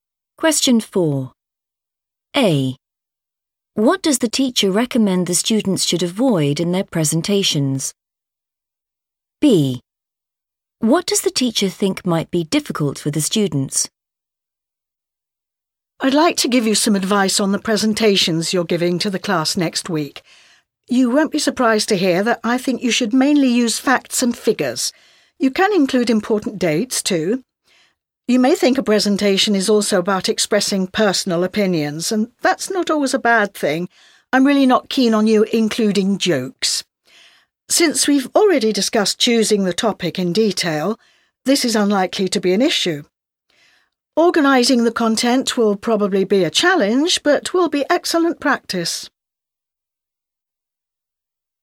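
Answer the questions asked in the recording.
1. jokes
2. organising the content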